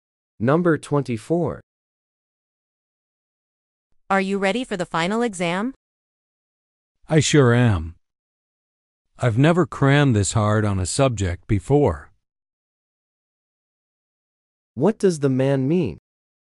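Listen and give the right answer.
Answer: He has studied very hard and is ready.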